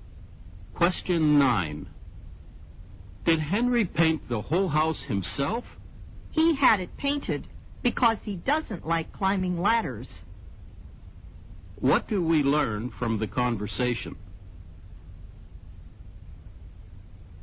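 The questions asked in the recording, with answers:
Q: What do we learn from the conversation?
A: Henry had someone else paint the house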